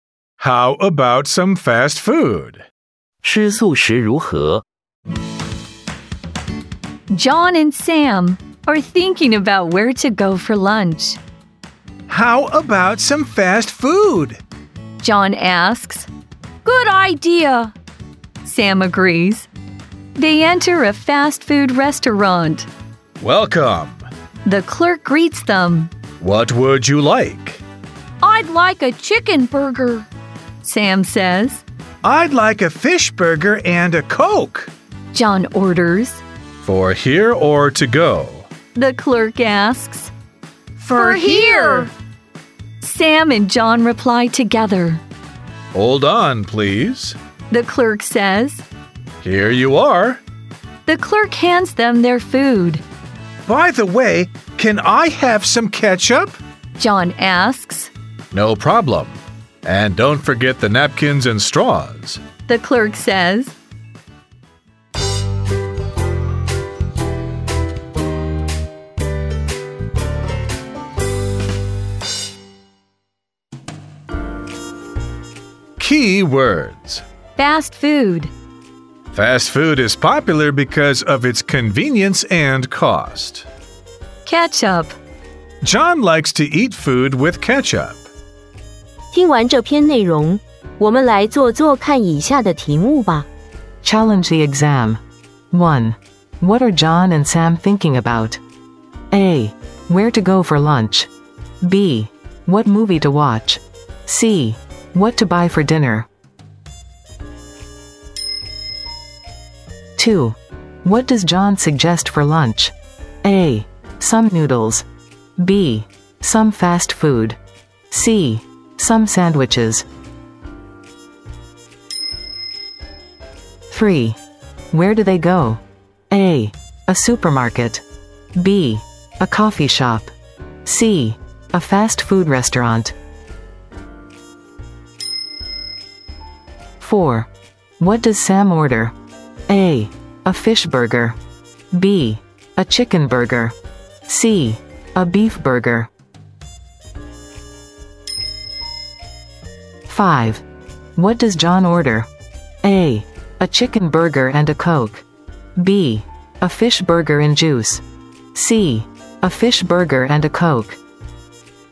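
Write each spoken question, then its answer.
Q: What are John and Sam thinking about?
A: A: Where to go for lunch

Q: What does John suggest for lunch?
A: B: Some fast food

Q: Where do they go?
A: C: A fast food restaurant

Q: What does Sam order?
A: B: A chicken burger

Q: What does John order?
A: C: A fish burger and a Coke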